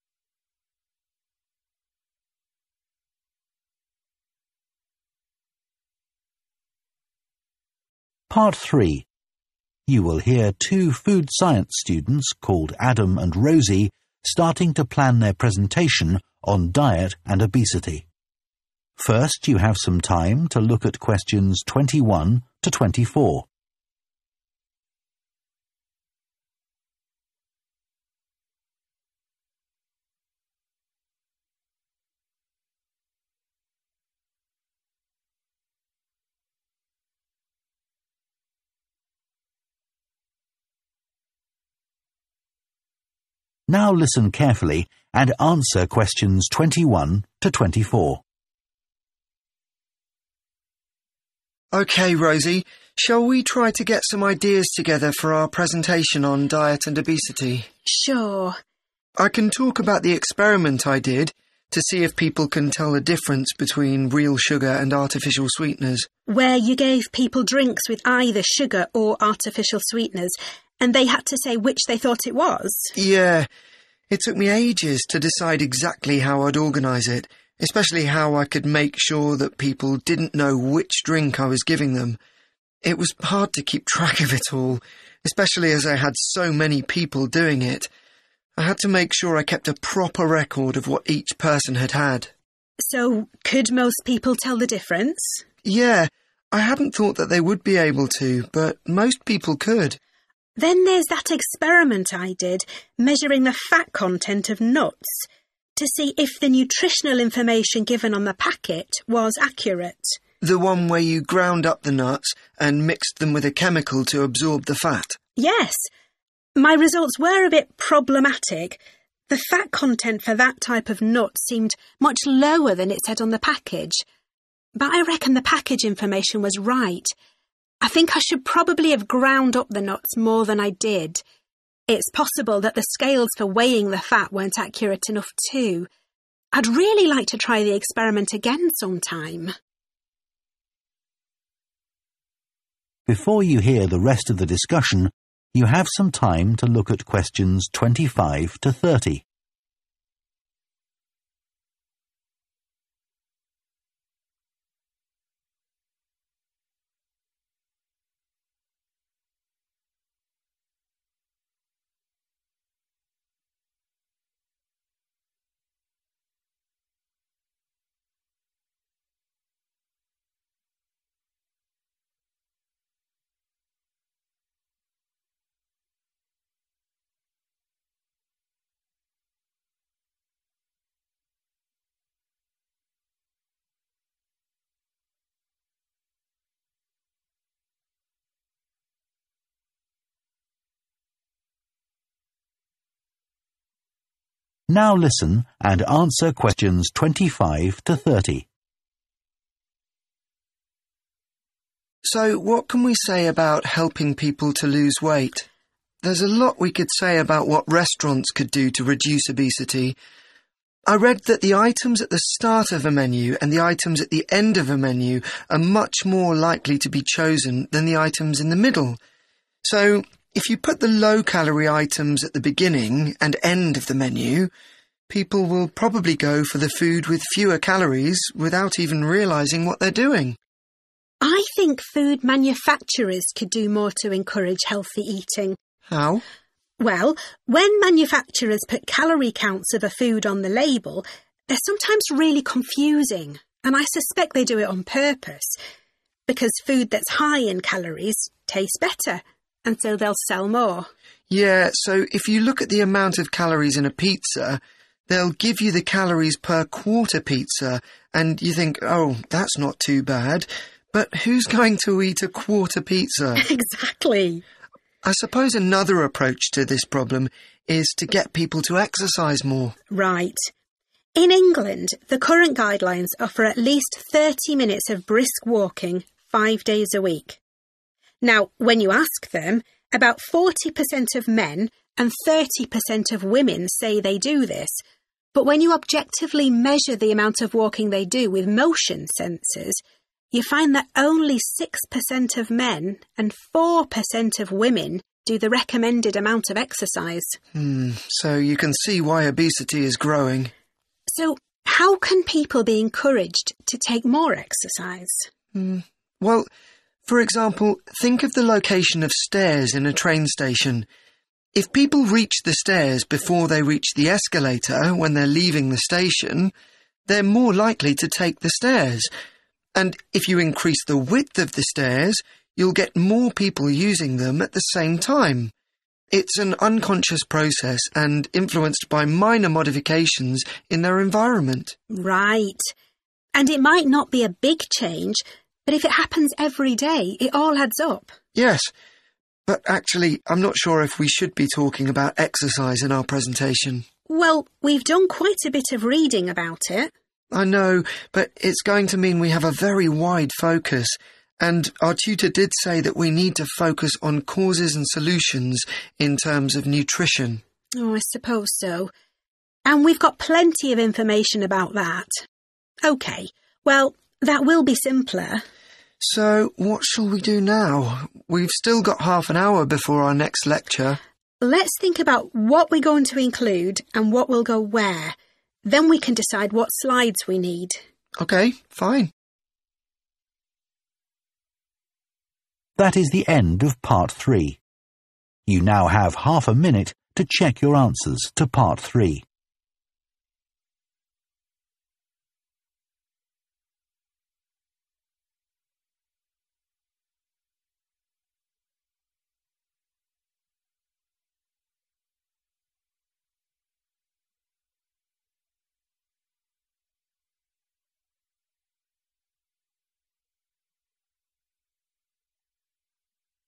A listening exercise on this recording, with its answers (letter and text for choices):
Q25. Adam suggests that restaurants could reduce obesity if their menus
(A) offered fewer options.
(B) had more low-calorie foods.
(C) were organised in a particular way.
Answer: (C) were organised in a particular way.

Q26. The students agree that food manufacturers deliberately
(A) make calorie counts hard to understand.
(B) fail to provide accurate calorie counts.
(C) use ineffective methods to reduce calories.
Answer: (A) make calorie counts hard to understand.

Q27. What does Rosie say about levels of exercise in England?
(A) The amount recommended is much too low.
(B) Most people overestimate how much they do.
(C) Women now exercise more than they used to.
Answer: (B) Most people overestimate how much they do.

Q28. Adam refers to the location and width of stairs in a train station to illustrate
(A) practical changes that can influence people's behaviour.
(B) methods of helping people who have mobility problems.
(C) ways of preventing accidents by controlling crowd movement.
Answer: (A) practical changes that can influence people's behaviour.

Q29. What do the students agree about including reference to exercise in their presentation?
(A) They should probably leave it out.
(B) They need to do more research on it.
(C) They should discuss this with their tutor.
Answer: (A) They should probably leave it out.

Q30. What are the students going to do next for their presentation?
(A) prepare some slides for it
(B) find out how long they have for it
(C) decide on its content and organisation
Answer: (C) decide on its content and organisation